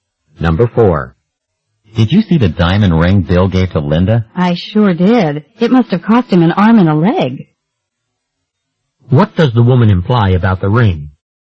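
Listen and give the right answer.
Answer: It was very expensive.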